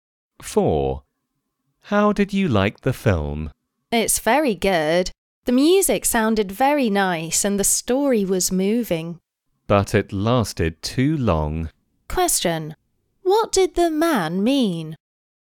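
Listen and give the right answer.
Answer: The film was good but too long.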